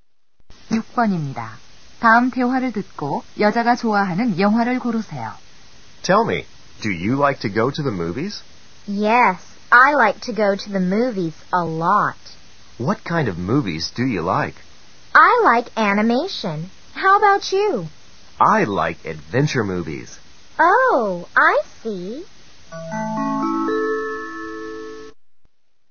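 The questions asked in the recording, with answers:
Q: 다음 대화를 듣고 여자가 좋아하는 영화를 고르세요.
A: 애니메이션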